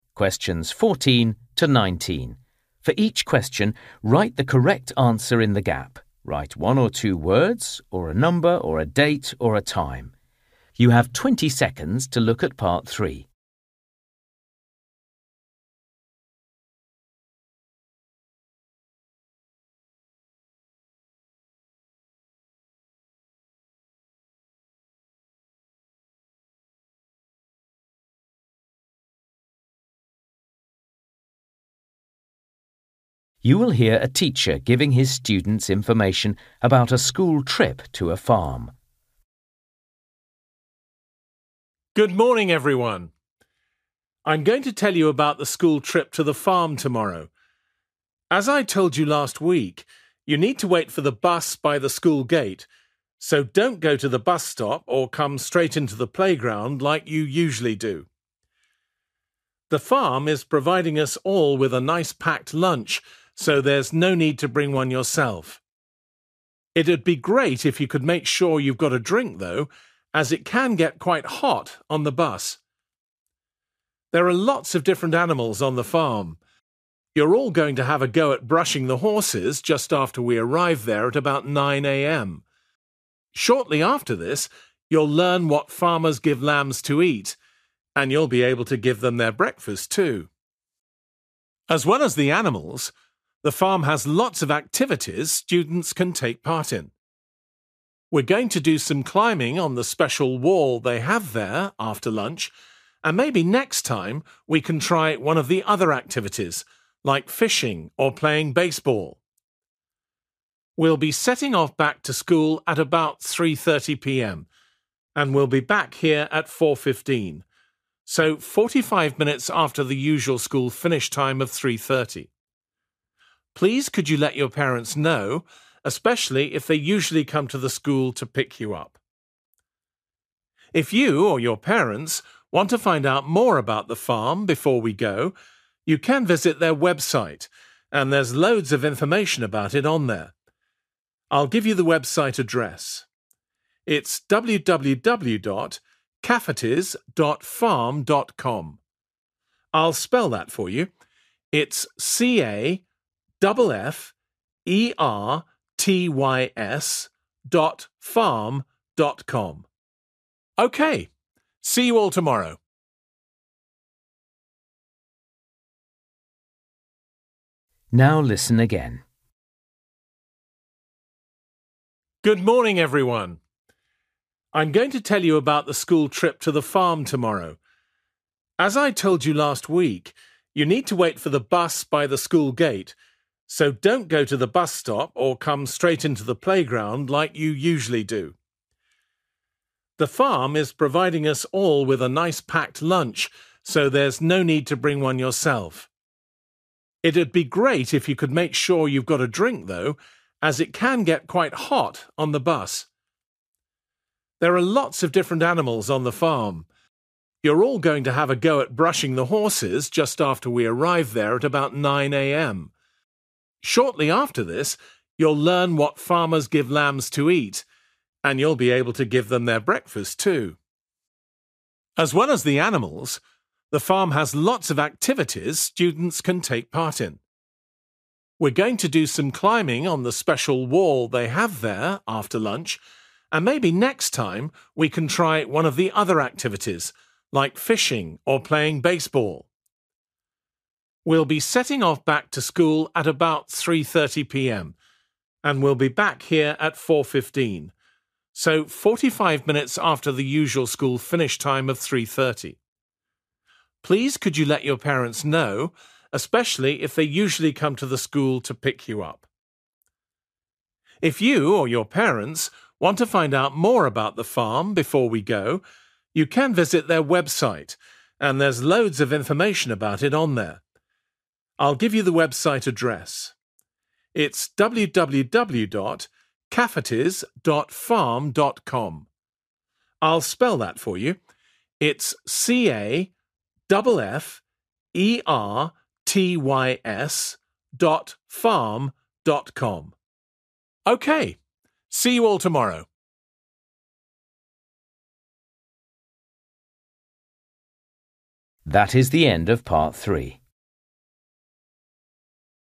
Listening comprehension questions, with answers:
For each question, write the correct answer in the gap. Write one or two words or a number or a date or a time.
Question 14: 8 a.m. next to the(14) ....................................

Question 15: a (15) ....................................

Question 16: feeding the (16) ....................................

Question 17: (17) ....................................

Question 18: (18) ....................................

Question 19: (19) www. .................................... .farm.com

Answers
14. (school) gate
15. drink
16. lambs
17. climbing (wall)
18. 4.15 / four fifteen
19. C-A-F-F-E-R-T-Y-S

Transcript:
For each question, write the correct answer in the gap. Write one or two words or a number or a date or a time.
You will hear a teacher giving his students information about a school trip to a farm.
School trip to farm |
14 (school) gate 15 drink 16 lambs
I'm going to tell you about the school trip to the farm tomorrow. As I told you last week, you need to wait for the bus by the school gate, so don't go to the bus stop or come straight into the playground like you usually do.
The farm is providing us all with a nice packed lunch, so there's no need to bring one yourself. It'd be great if you could make sure you've got a drink, though, as it can get quite hot on the bus.
There are lots of different animals on the farm. You're all going to have a go at brushing the horses just after we arrive there at about 9 a.m. Shortly after this, you'll learn what farmers give lambs to eat, and you'll be able to give them their breakfast, too.
As well as the animals, the farm has lots of activities students can take part in. We're going to do some climbing on the special wall they have there after lunch, and maybe next time we can try one of the other activities like fishing or playing baseball.
We'll be setting off back to school at about 3.30 p.m., and will be back here at 4.15, so 45 minutes after the usual school finish time of 3.30. Please could you let your parents know, especially if they usually come to the school to pick you up.
If you or your parents want to find out more about the farm before we go, you can visit their website and there's loads of information about it on there. I'll give you the website address: it's www dot caffertys dot farm dot com. I'll spell that for you: it's C-A-double F-E-R-T-Y-S dot farm dot com.
OK, see you all tomorrow.